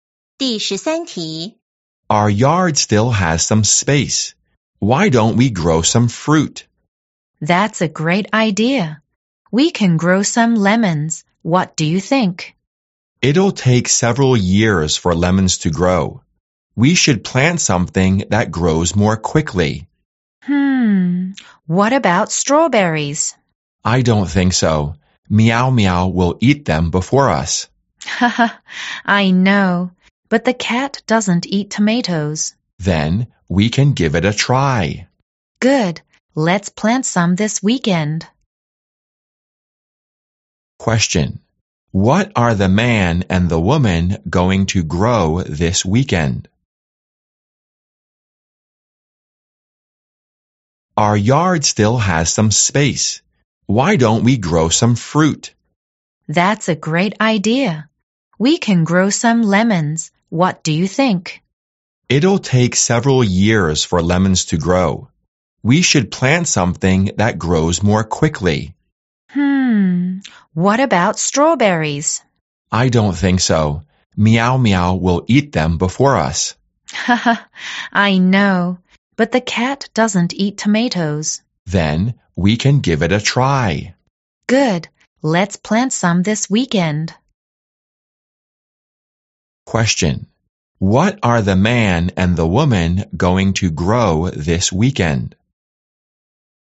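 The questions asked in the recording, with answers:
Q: Question. What are the man and the woman going to grow this weekend?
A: Tomatoes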